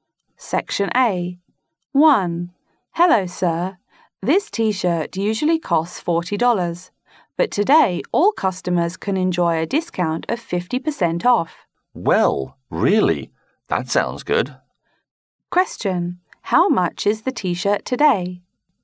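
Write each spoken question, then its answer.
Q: How much is the T-shirt today?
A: $20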